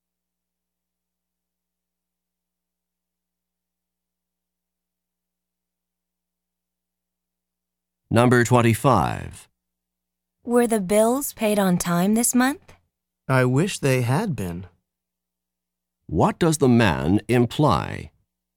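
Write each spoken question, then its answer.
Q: What does the man imply?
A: The bills weren't paid on time.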